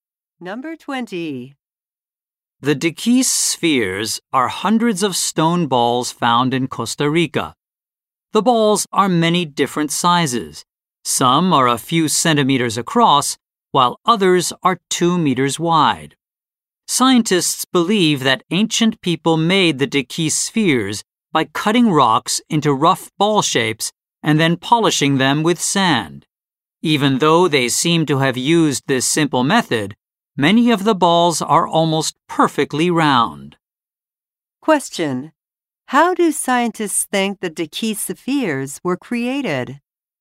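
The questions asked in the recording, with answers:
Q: How do scientists think the Dekis spheres were created?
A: By cutting rocks into rough balls and polishing them with sand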